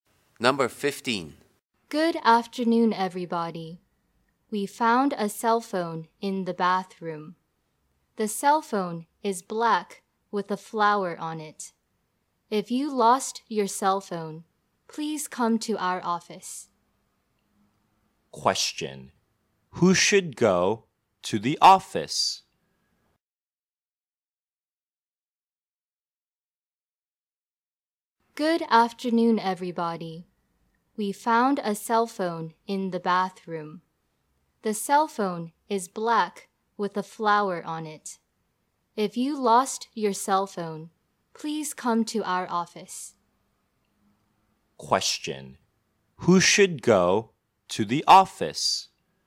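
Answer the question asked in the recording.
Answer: The person who lost a black cell phone with a flower on it.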